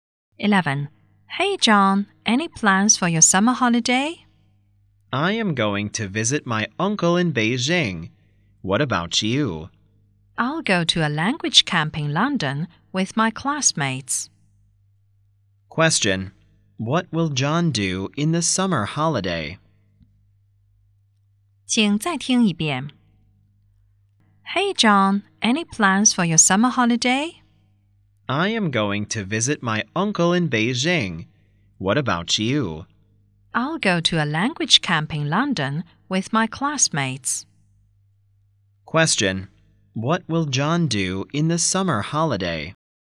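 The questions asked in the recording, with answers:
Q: what will John do in the summer holiday?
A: Visit his uncle in Beijing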